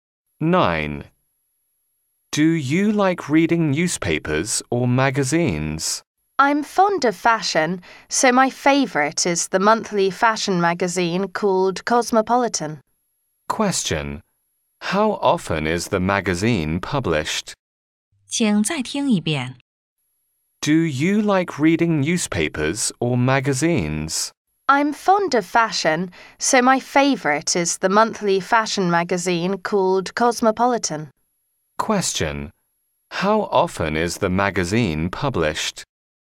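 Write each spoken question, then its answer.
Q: How often is the magazine published?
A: Monthly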